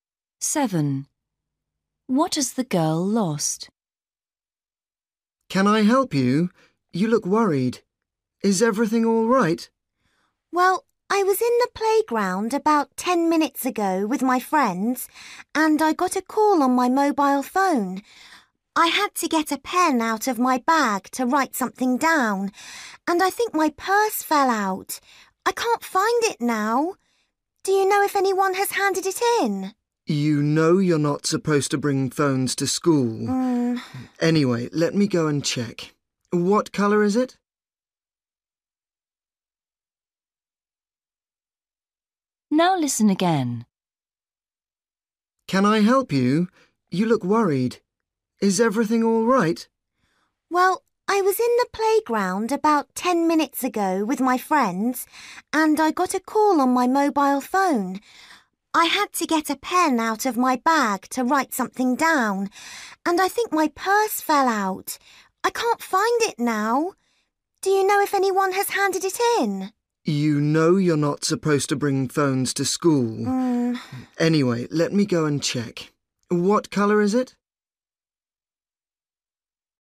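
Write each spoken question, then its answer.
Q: What has the girl lost?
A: Her purse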